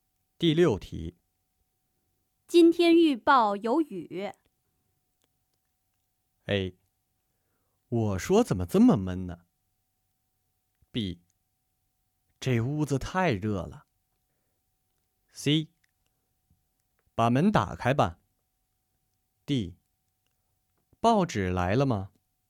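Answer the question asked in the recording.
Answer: A: 我说怎么这么闷呢?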